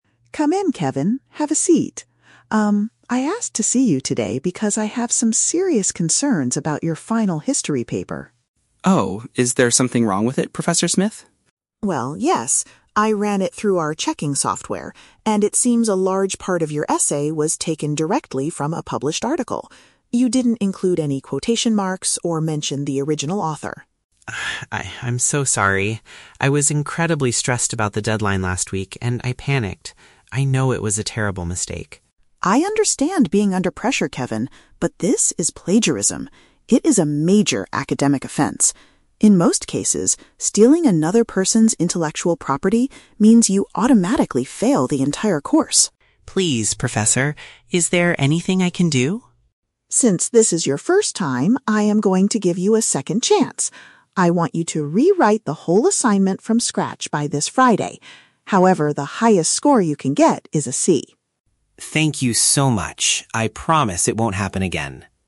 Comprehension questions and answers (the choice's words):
Listen to the conversation between a university professor and a student. Choose the correct answer (A, B, or C) for each question.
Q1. Why did the professor want to speak with Kevin?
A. To praise his excellent history essay.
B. To discuss a problem with his recent assignment.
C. To help him install a new checking software.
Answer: To discuss a problem with his recent assignment.

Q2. What is Kevin's excuse for his behavior?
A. He did not know how to use quotation marks.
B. He lost his original notes for the history course.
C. He was feeling anxious because of a time limit.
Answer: He was feeling anxious because of a time limit.

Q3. How does the professor decide to handle the situation?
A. She gives him a failing grade for the whole course.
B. She tells him to do the work again for a lower grade.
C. She reports him to the university's academic committee.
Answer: She tells him to do the work again for a lower grade.

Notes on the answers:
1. The Key: The professor says she has "serious concerns about your final history paper." Having serious concerns about a paper means there is a problem with his recent assignment. The Trap (C): The professor mentions using a "checking software", but she used it to scan his paper, not to help him install it. Plausible but not mentioned (A): Teachers often call students in to praise them, but in this case, Kevin did something wrong.
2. The Key: Kevin says, "I was incredibly stressed about the deadline last week." Being stressed about a deadline means feeling anxious because of a time limit. The Trap (A): The professor mentions that Kevin didn't use "quotation marks," but Kevin doesn't say he didn't know how to use them; his excuse was stress. Plausible but not mentioned (B): Losing notes could cause a student to panic and cheat, but Kevin does not say he lost anything.
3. The Key: The professor says, "I want you to rewrite the whole assignment... However, the highest score you can get is a C." "Rewrite" means do it again, and a "C" is a lower grade. The Trap (A): The professor says that plagiarism usually means you "automatically fail the entire course." However, she decides to give him a "second chance," so she does not fail him this time. Plausible but not mentioned (C): Reporting to a committee is a real punishment for plagiarism at universities, but the professor decides to handle it directly with Kevin instead.

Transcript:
Professor: Come in, Kevin. Have a seat. Um, I asked to see you today because I have some serious concerns about your final history paper.
Kevin: Oh? Is there something wrong with it, Professor Smith?
Professor: Well, yes. I ran it through our checking software, and it seems a large part of your essay was taken directly from a published article. You didn't include any quotation marks or mention the original author.
I... I'm so sorry. I was incredibly stressed about the deadline last week, and I panicked. I know it was a terrible mistake.
Professor: I understand being under pressure, Kevin, but this is plagiarism. It is a major academic offense. In most cases, stealing another person's intellectual property means you automatically fail the entire course.
Kevin: Please, Professor. Is there anything I can do?
Professor: Since this is your first time, I am going to give you a second chance. I want you to rewrite the whole assignment from scratch by this Friday. However, the highest score you can get is a C.